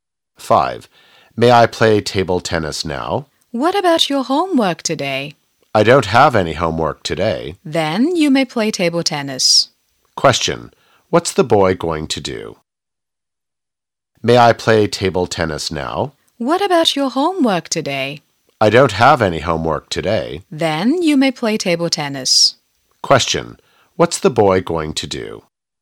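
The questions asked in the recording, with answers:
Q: What's the boy going to do?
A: Play table tennis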